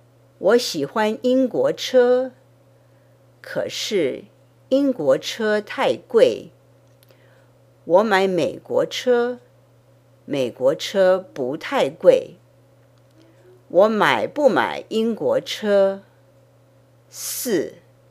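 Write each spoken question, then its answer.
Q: 我买不买英国车?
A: 不买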